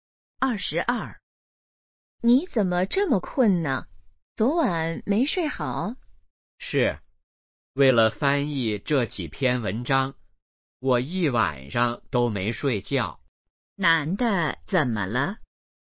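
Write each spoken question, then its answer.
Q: 男的怎么了?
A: 一晚上没睡觉,很困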